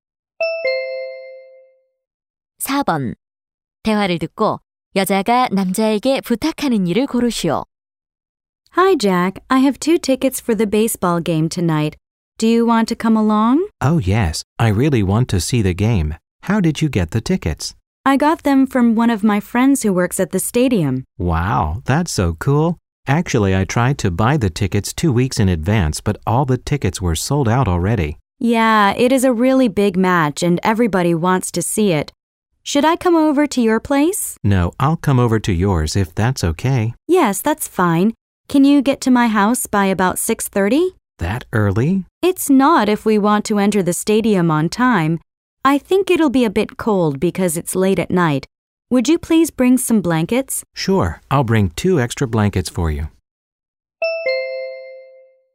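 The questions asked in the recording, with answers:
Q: 대화를 듣고 여자가 남자에게 부탁하는 일을 고르시오.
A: 담요 가져오기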